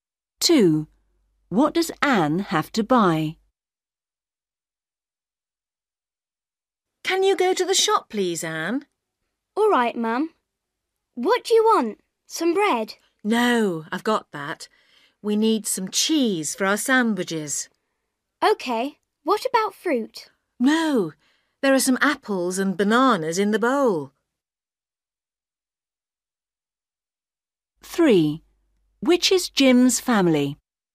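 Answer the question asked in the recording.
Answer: some cheese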